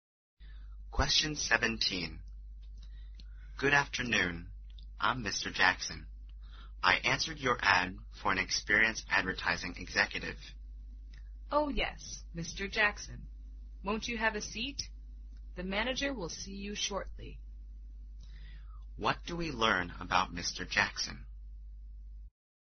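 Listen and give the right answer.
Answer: He has come for an interview for an advertising executive job.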